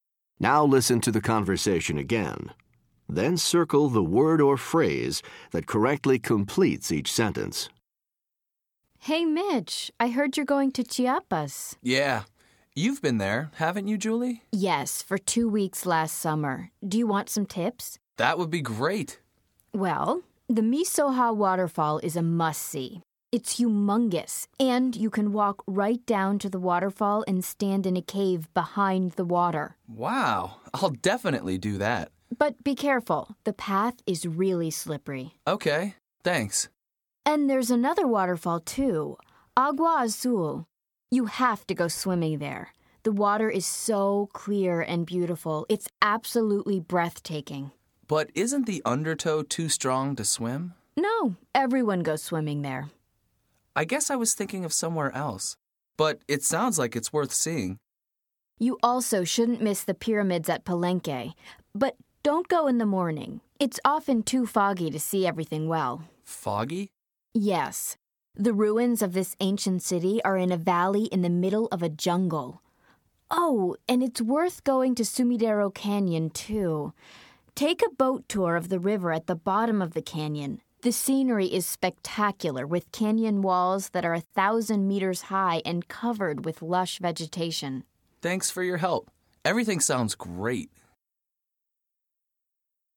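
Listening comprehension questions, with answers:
Listen to the conversation again. Then choose the word or phrase that correctly completes each sentence.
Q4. There is a .......... at Miso-ha.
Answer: cave

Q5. The path to Miso-ha can be ........... .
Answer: slippery

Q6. Julie recommends going to Palenque to see ........... .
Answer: the pyramids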